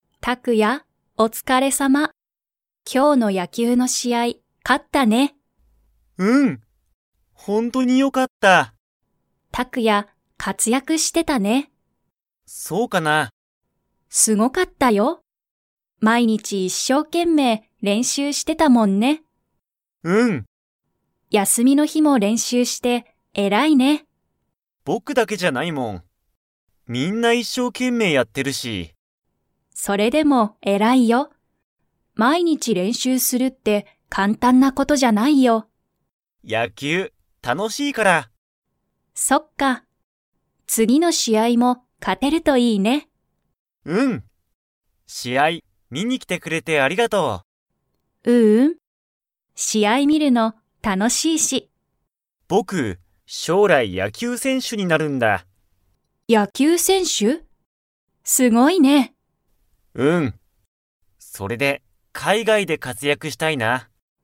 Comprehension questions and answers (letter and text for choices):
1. タクヤは毎日まいにち、野球やきゅうの練習れんしゅうをしていましたか?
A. はい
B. いいえ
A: A. はい

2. タクヤは将来しょうらい、 で活躍かつやくしたい。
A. 大学だいがく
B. 会社かいしゃ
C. 海外かいがい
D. 国内こくない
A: C. 海外かいがい

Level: Level 4